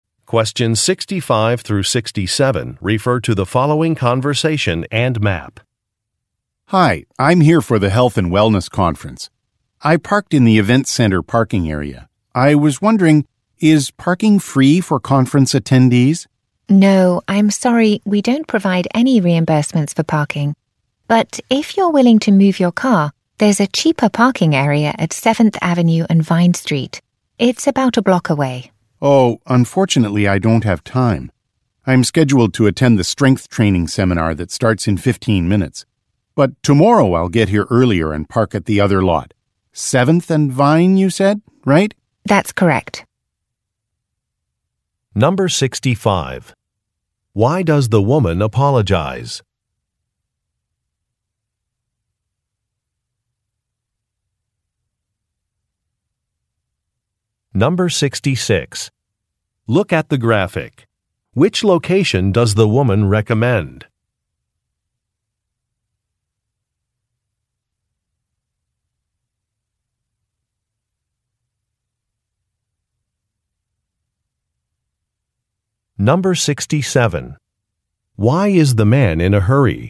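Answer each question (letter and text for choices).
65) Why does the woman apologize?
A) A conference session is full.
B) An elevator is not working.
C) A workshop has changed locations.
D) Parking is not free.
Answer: D) Parking is not free.

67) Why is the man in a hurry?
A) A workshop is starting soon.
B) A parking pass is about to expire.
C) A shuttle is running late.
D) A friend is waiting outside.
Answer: A) A workshop is starting soon.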